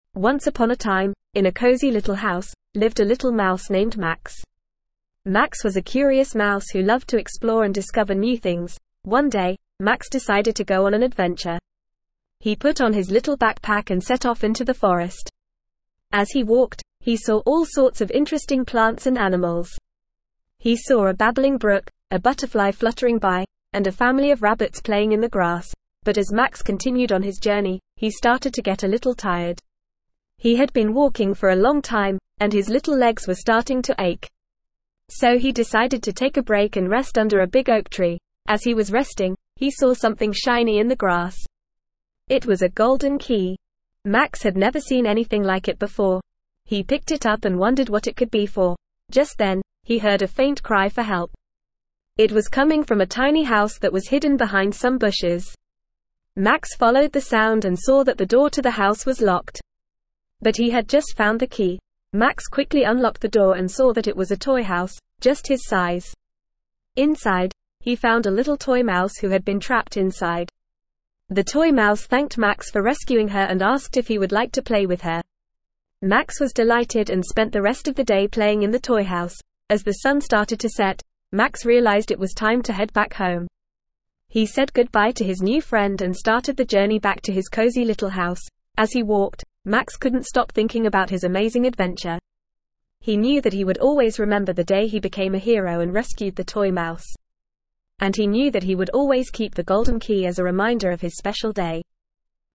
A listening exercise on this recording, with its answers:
Please fill in the gaps.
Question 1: The main character of the story is a _____ mouse named Max.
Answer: little

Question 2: Max loves to _____ and discover new things.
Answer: explore

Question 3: On his journey, Max sees a _____ brook, a butterfly, and a family of rabbits.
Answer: babbling

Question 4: Max takes a break because his little legs are starting to _____.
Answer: ache

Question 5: Max finds a _____ key in the grass.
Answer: golden

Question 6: The toy mouse is crying for _____ in the tiny house.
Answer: help

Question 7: Max _____ the door to the tiny house using the golden key to rescue the toy mouse.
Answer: unlocks

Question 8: The toy mouse asks Max if he would like to _____ with her.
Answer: play

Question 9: Max spends the rest of the day _____ in the toy house.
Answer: playing

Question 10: Max keeps the golden key as a reminder of his special day when he _____ the toy mouse.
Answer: rescued

Please answer the following questions with your teacher or partner.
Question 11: What is the main character's name?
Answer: The main character's name is Max.

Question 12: What does the main character like to do?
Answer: The main character likes to explore and discover new things.

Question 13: What does the main character see on his journey through the forest?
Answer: The main character sees a babbling brook, a butterfly, and a family of rabbits.

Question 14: Why does the main character decide to take a break?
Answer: The main character decides to take a break because his little legs are starting to ache.

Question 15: What does the main character find in the grass?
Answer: The main character finds a golden key in the grass.

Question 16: Who is crying for help in the tiny house?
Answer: A toy mouse is crying for help in the tiny house.

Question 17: What does the main character do to help the toy mouse?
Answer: The main character unlocks the door to the tiny house using the golden key to rescue the toy mouse.

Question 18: What does the toy mouse ask the main character to do?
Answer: The toy mouse asks the main character if he would like to play with her.

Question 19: What does the main character do for the rest of the day?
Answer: The main character spends the rest of the day playing in the toy house.

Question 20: Why does the main character keep the golden key?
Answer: The main character keeps the golden key as a reminder of his special day when he rescued the toy mouse.

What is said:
Once upon a time, in a cozy little house, lived a little mouse named Max. Max was a curious mouse who loved to explore and discover new things.
One day, Max decided to go on an adventure. He put on his little backpack and set off into the forest. As he walked, he saw all sorts of interesting plants and animals. He saw a babbling brook, a butterfly fluttering by, and a family of rabbits playing in the grass.
But as Max continued on his journey, he started to get a little tired. He had been walking for a long time, and his little legs were starting to ache. So he decided to take a break and rest under a big oak tree.
As he was resting, he saw something shiny in the grass. It was a golden key! Max had never seen anything like it before. He picked it up and wondered what it could be for.
Just then, he heard a faint cry for help. It was coming from a tiny house that was hidden behind some bushes. Max followed the sound and saw that the door to the house was locked. But he had just found the key!
Max quickly unlocked the door and saw that it was a toy house, just his size. Inside, he found a little toy mouse who had been trapped inside. The toy mouse thanked Max for rescuing her and asked if he would like to play with her. Max was delighted and spent the rest of the day playing in the toy house.
As the sun started to set, Max realized it was time to head back home. He said goodbye to his new friend and started the journey back to his cozy little house.
As he walked, Max couldn't stop thinking about his amazing adventure. He knew that he would always remember the day he became a hero and rescued the toy mouse. And he knew that he would always keep the golden key as a reminder of his special day.

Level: Level 2